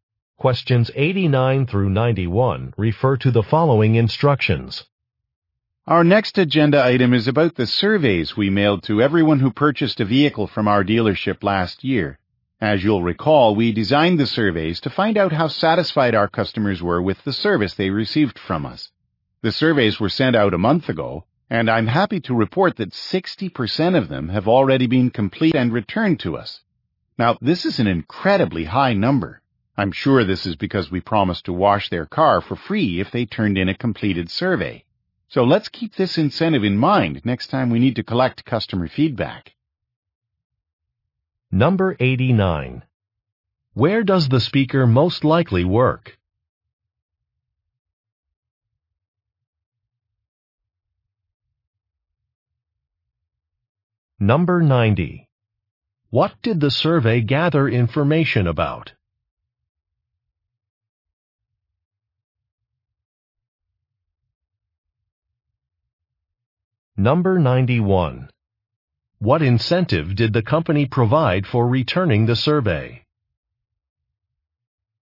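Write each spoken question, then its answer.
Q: Where does the speaker most likely work?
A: At a car dealership

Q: What did the survey gather information about?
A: Customer satisfaction with service

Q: What incentive did the company provide for returning the survey?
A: A free car wash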